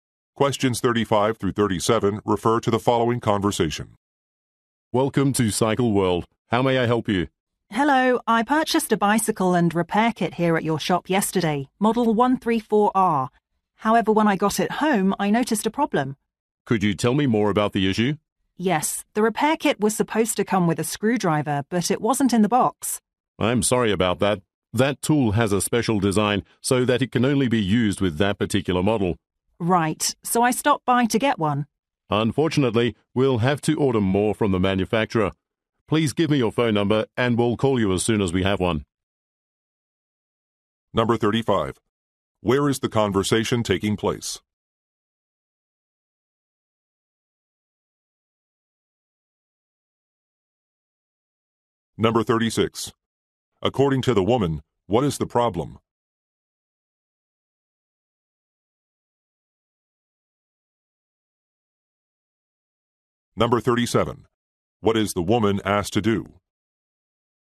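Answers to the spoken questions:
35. At a bicycle shop
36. A screwdriver was missing from the repair kit
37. Give her phone number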